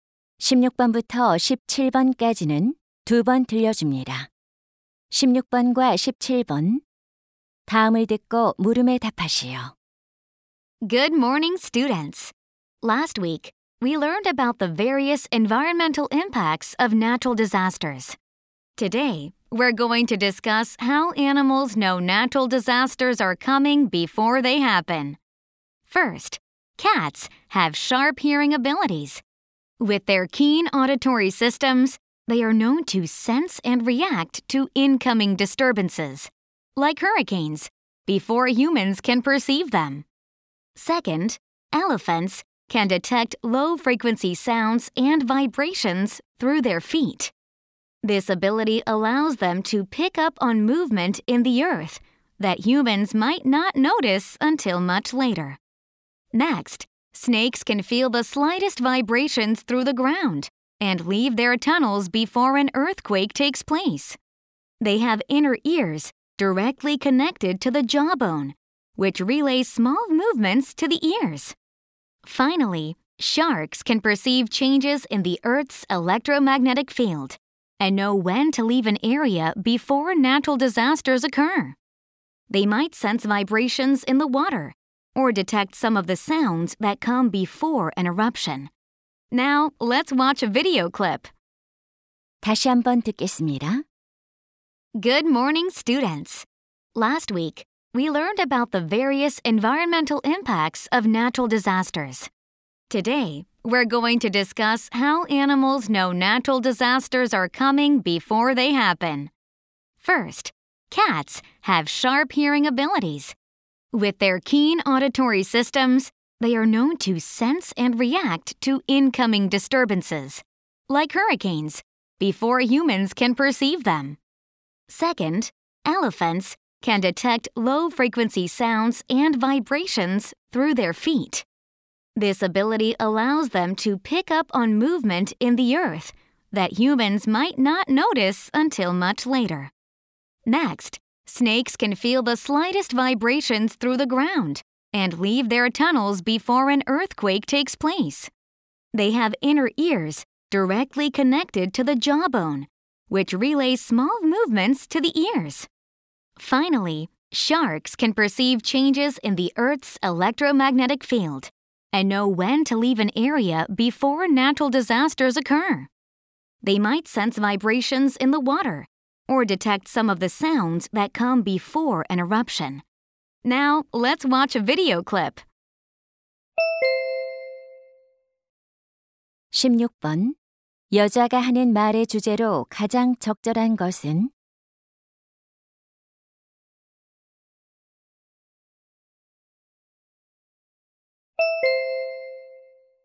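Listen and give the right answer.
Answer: 동물들이 자연재해를 미리 감지하는 방법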